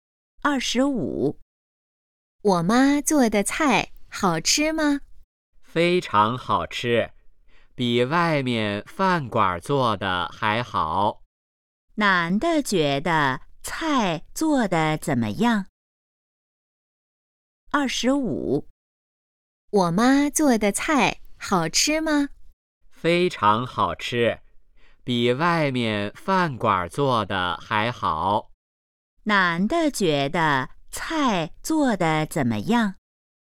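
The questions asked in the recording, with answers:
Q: 男的觉得菜做的怎么样?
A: 非常好吃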